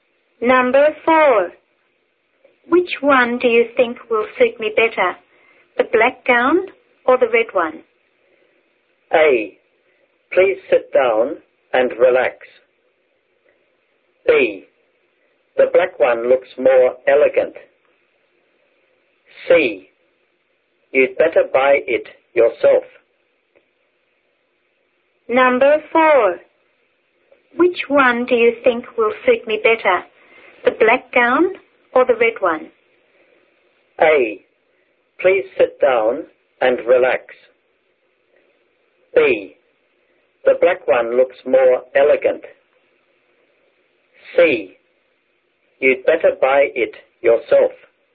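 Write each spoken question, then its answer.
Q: Which one do you think will suit me better, the black gown or the red one?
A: B: The black one looks more elegant.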